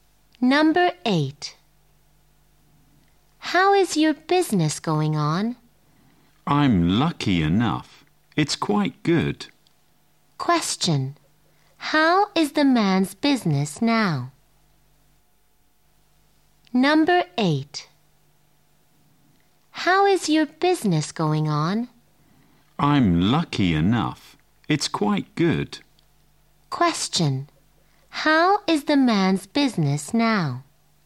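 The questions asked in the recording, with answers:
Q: How is the man's business now?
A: Quite good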